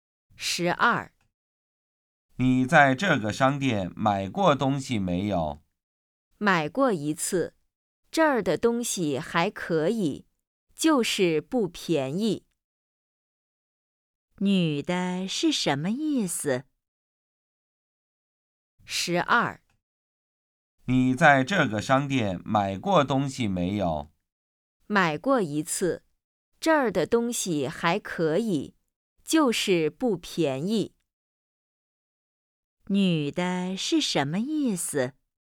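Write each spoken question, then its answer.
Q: 女的是什么意思?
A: 这个商店的东西不便宜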